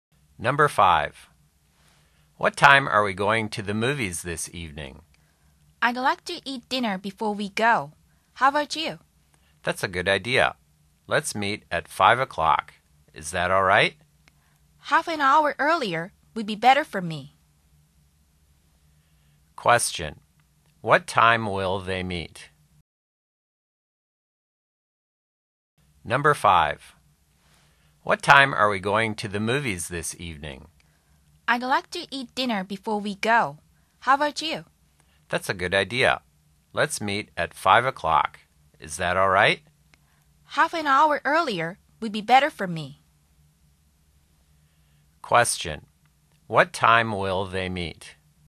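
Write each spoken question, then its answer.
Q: What time will they meet?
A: At 4:30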